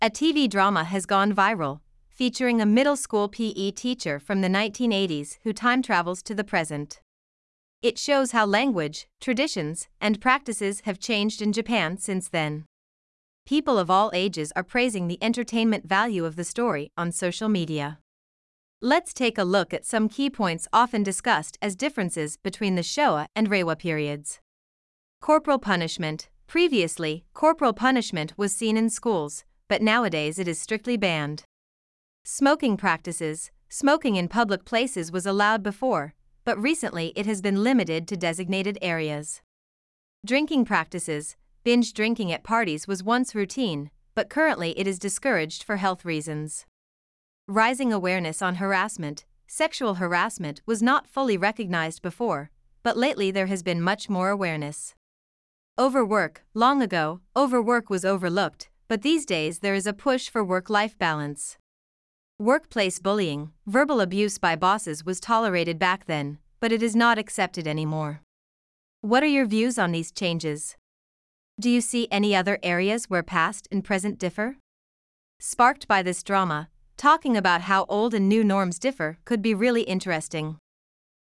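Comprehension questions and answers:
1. Smoking ( ) before.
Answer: in public places was allowed

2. ( ) was once routine.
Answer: Binge drinking at parties

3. Verbal abuse by bosses ( ).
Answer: was tolerated back then

この中で「昭和と令和の違い」として取り上げた6項目の具体例のうち、4つ以上を列挙してみましょう。答えは日本語でもOKです。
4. この中で「昭和と令和の違い」として取り上げた6項目の具体例のうち、4つ以上を列挙してみましょう。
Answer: 体罰、喫煙習慣、飲酒習慣(一気飲み)、セクハラ、過重労働、職場のいじめ(上司の暴言)

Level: 中級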